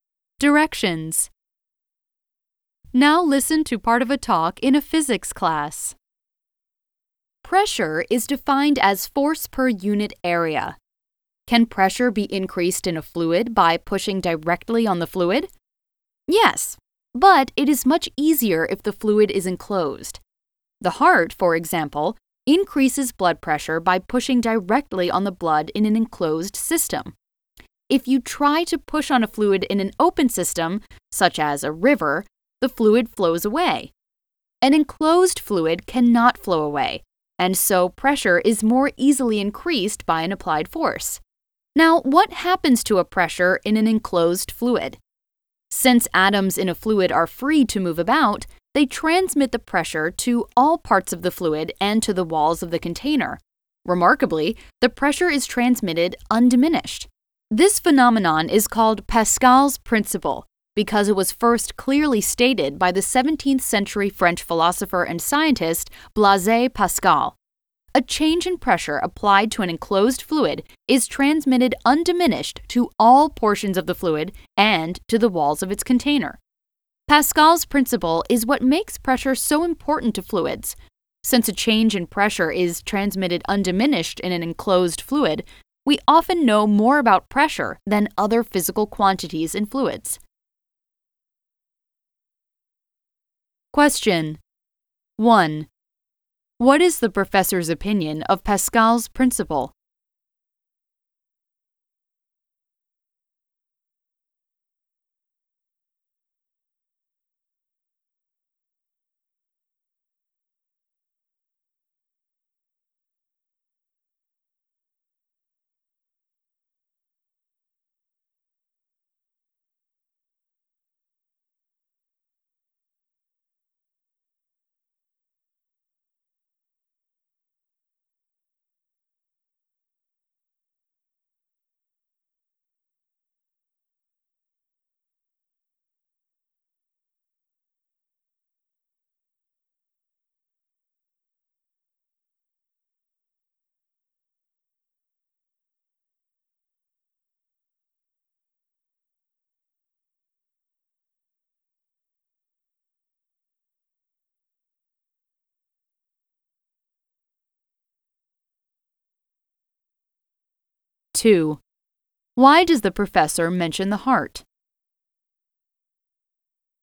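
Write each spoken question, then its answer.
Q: Why does the professor mention the heart?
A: As an example of increasing pressure by pushing directly on a fluid in an enclosed system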